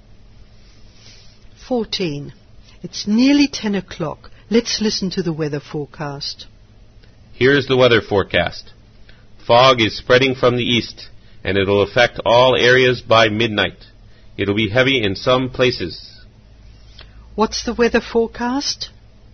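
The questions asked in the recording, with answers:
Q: What's the weather forecast?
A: Heavy fog spreading from the east to all areas by midnight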